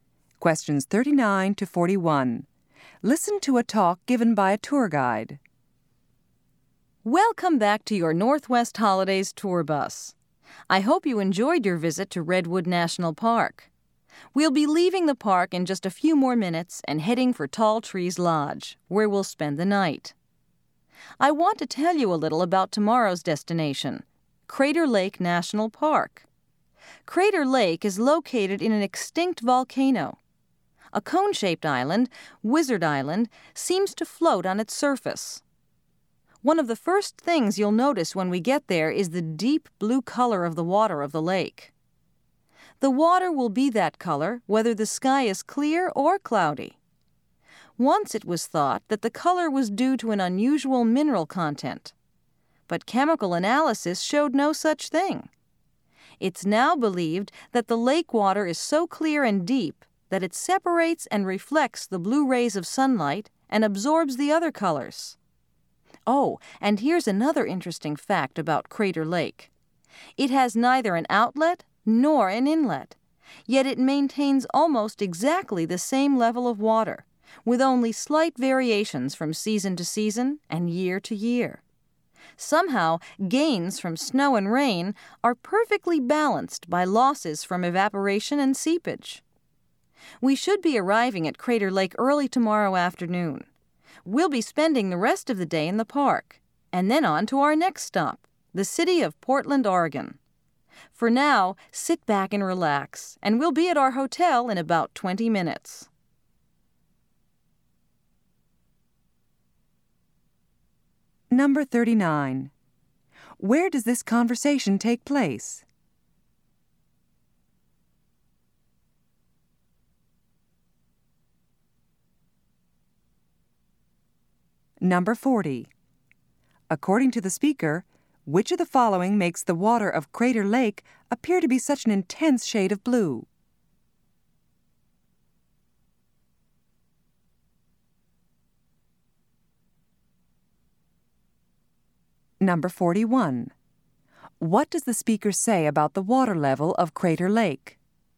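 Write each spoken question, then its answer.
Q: Where does this conversation take place?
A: On a tour bus

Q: According to the speaker, which of the following makes the water of Crater Lake appear to be such an intense shade of blue?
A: The clear, deep water reflects the blue rays of sunlight and absorbs the other colors.

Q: What does the speaker say about the water level of Crater Lake?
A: It stays almost exactly the same.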